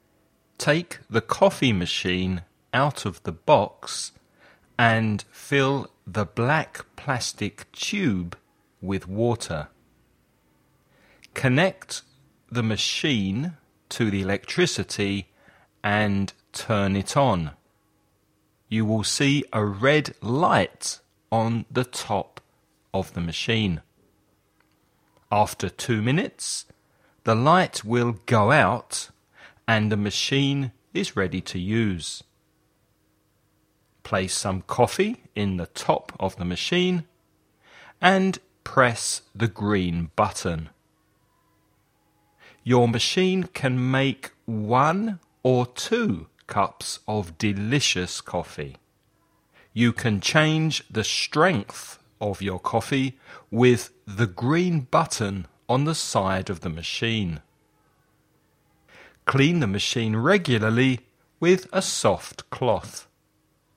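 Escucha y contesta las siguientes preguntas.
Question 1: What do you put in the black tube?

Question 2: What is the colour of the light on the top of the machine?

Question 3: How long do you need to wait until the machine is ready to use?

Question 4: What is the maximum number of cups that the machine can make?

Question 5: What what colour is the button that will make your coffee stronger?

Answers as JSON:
{"1": "Water", "2": "Red", "3": "2 minutes", "4": "2", "5": "Green"}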